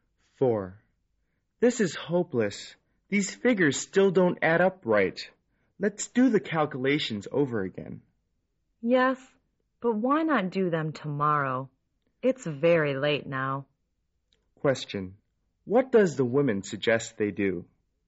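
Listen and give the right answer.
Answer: Do the calculations again tomorrow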